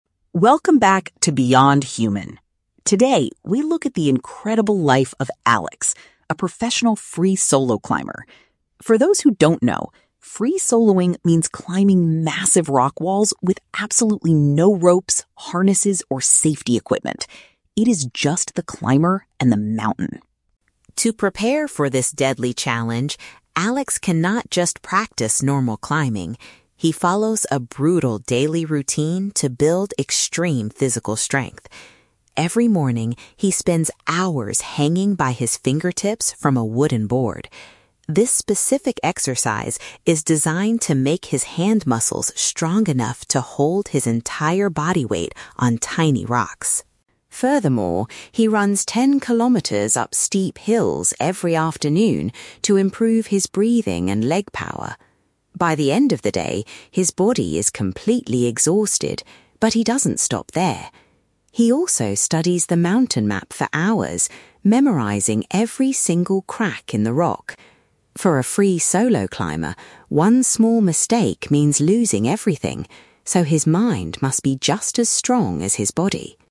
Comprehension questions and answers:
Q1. How does the narrator describe "free soloing"?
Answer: It is a style of climbing done entirely without protective gear.

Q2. Why does Alex practice hanging from a wooden board?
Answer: To develop enough power in his hands to support himself.

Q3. What does Alex do after his physical workouts are finished?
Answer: He carefully learns the detailed surface of his climbing route.

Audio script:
Narrator: Welcome back to 'Beyond Human'. Today, we look at the incredible life of Alex, a professional free solo climber. For those who don't know, free soloing means climbing massive rock walls with absolutely no ropes, harnesses, or safety equipment. It is just the climber and the mountain.
To prepare for this deadly challenge, Alex cannot just practice normal climbing. He follows a brutal daily routine to build extreme physical strength. Every morning, he spends hours hanging by his fingertips from a wooden board. This specific exercise is designed to make his hand muscles strong enough to hold his entire body weight on tiny rocks.
Furthermore, he runs ten kilometers up steep hills every afternoon to improve his breathing and leg power. By the end of the day, his body is completely exhausted, but he doesn't stop there. He also studies the mountain map for hours, memorizing every single crack in the rock. For a free solo climber, one small mistake means losing everything, so his mind must be just as strong as his body.